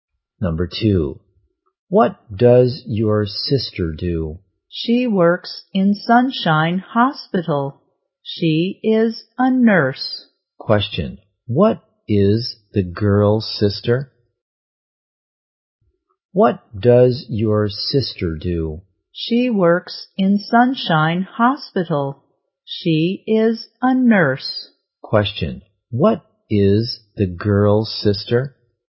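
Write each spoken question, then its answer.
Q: what is the girl's sister?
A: A nurse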